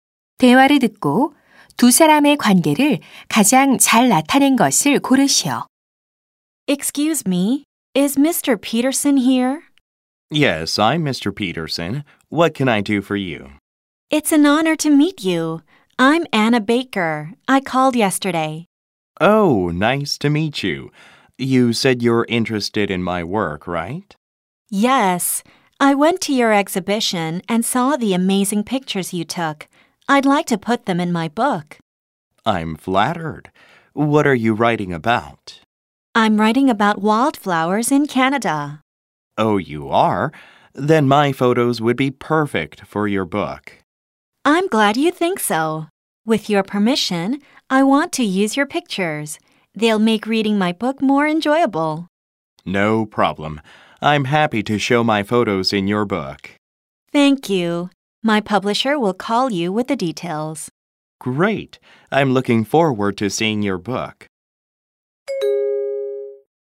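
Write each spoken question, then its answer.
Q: 대화를 듣고 두 사람의 관계를 가장 잘 나타낸 것을 고르시오.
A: 사진작가 — 작가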